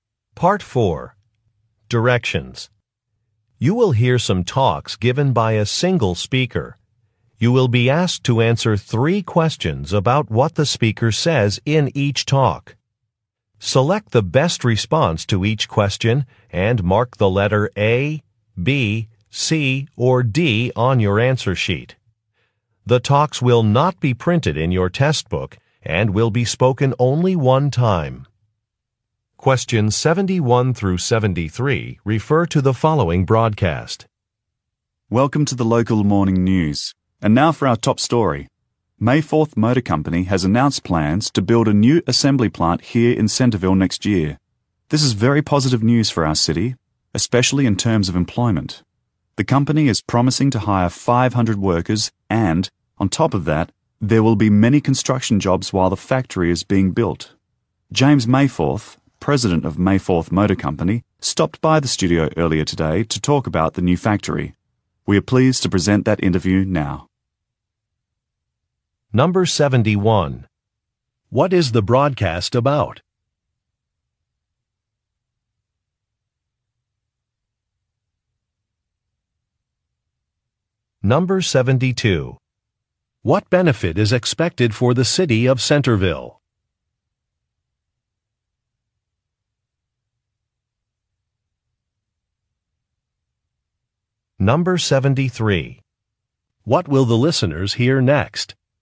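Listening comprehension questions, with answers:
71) What is the broadcast about?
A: A new factory

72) What benefit is expected for the city of Centerville?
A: Employment will increase.

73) What will the listeners hear next?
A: An interview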